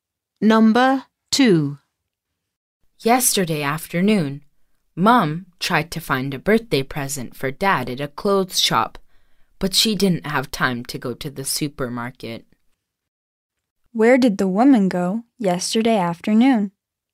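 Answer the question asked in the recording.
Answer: To a clothes shop.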